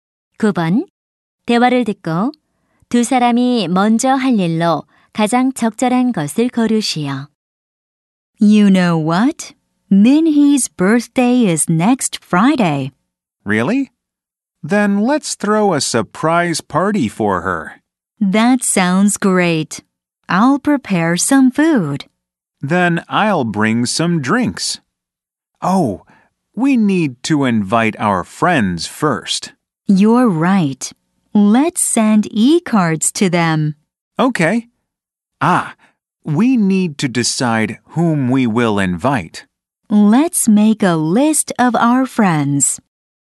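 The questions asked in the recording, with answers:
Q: 대화를 듣고 두 사람이 먼저 할 일로 가장 적절한 것을 고르시오.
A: 초대할 친구 목록 만들기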